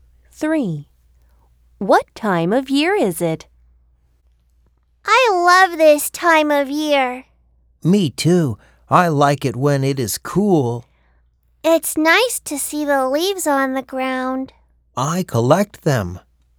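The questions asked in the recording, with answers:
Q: What time of year is it?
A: Autumn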